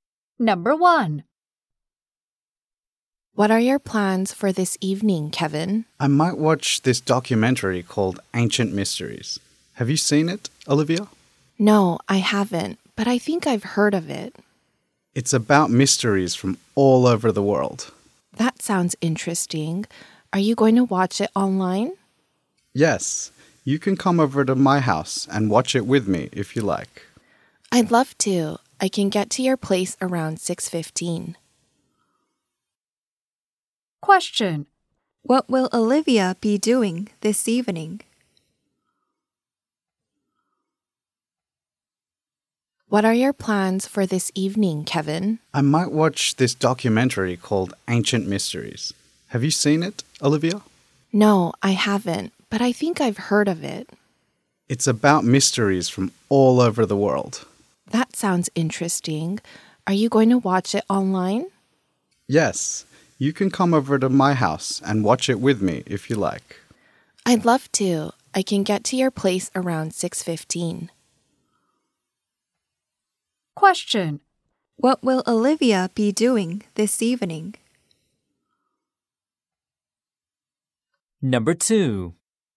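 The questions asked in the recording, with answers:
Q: What will Olivia be doing this evening?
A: Watching the documentary Ancient Mysteries at Kevin's house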